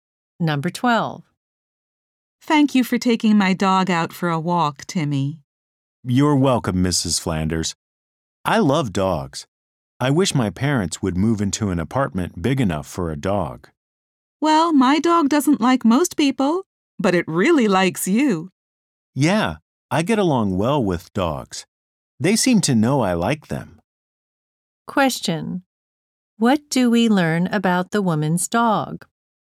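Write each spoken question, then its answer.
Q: What do we learn about the woman's dog?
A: It doesn't like most people, but it likes Timmy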